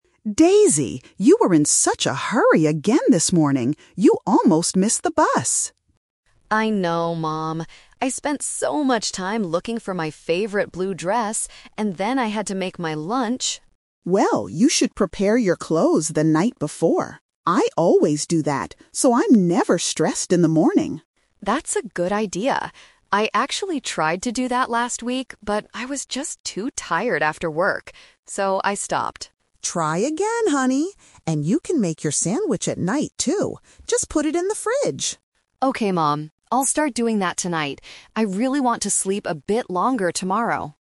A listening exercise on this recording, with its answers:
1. Why was Daisy in a hurry this morning?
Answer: She couldn't find her clothes.

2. What does the mother suggest Daisy do at night?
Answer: Prepare her clothes and lunch.

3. When did Daisy first try to prepare things the night before?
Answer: Last week.

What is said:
Mom: Daisy, you were in such a hurry again this morning! You almost missed the bus.
Daisy: I know, Mom. I spent so much time looking for my favorite blue dress, and then I had to make my lunch.
Mom: Well, you should prepare your clothes the night before. I always do that, so I'm never stressed in the morning.
Daisy: That's a good idea. I actually tried to do that last week, but I was just too tired after work. So I stopped.
Mom: Try again, honey. And you can make your sandwich at night, too. Just put it in the fridge.
Daisy: Okay, Mom. I'll start doing that tonight. I really want to sleep a bit longer tomorrow!